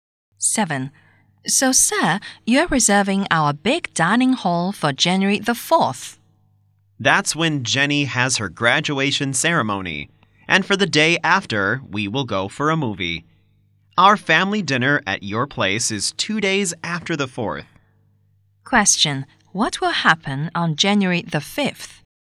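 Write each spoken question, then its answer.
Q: Question, what will happen on January the 5th?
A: They will go to a movie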